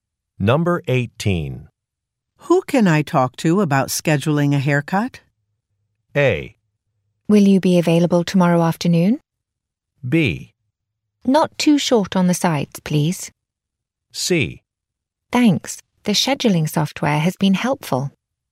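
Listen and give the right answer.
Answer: A: Will you be available tomorrow afternoon?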